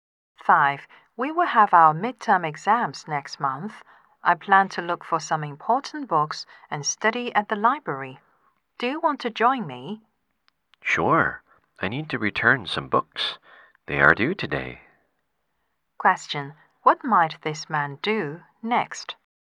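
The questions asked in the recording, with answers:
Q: What might this man do next?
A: Go to the library with the woman (to return books)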